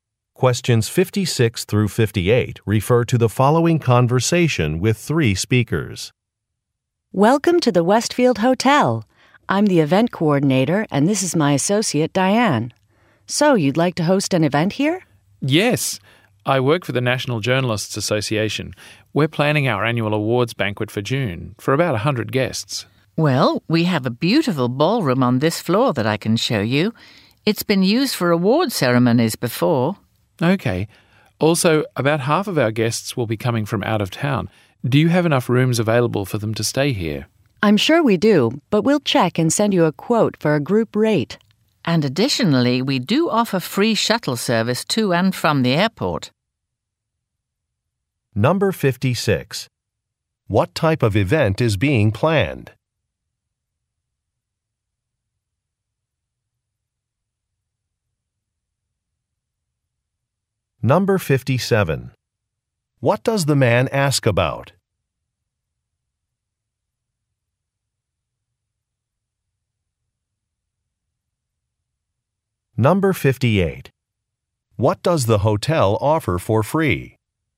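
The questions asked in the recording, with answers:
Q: What type of event is being planned?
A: An awards banquet

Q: What does the man ask about?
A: Room availability for guests

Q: What does the hotel offer for free?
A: Airport shuttle service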